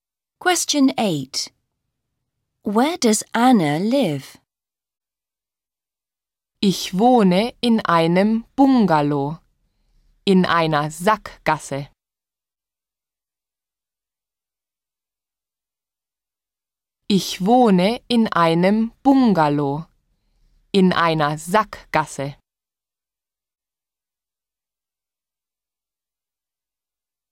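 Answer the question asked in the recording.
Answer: In a bungalow in a cul-de-sac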